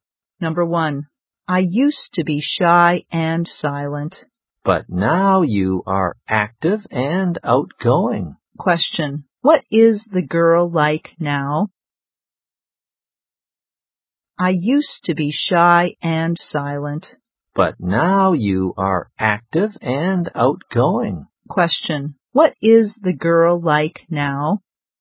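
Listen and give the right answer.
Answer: Active and outgoing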